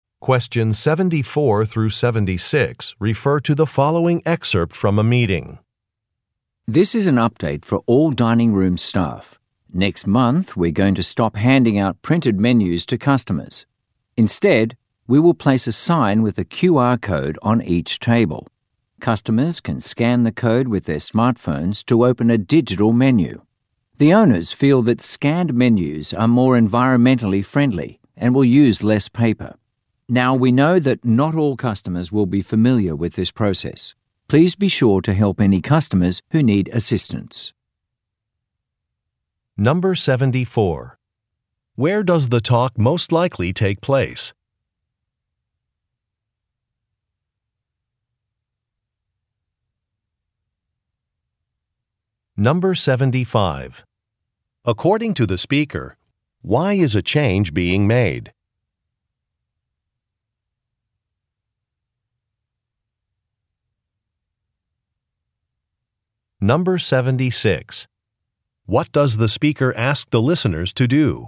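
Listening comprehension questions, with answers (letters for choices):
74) Where does the talk most likely take place?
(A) At a restaurant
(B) At a print shop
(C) At a computer store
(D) At a manufacturing plant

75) According to the speaker, why is a change being made?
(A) To save storage space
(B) To address customer feedback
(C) To be environmentally responsible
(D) To improve employee satisfaction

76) What does the speaker ask the listeners to do?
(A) Review a safety manual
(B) Record time accurately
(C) Wear appropriate clothing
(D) Assist customers with a process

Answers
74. A
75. C
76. D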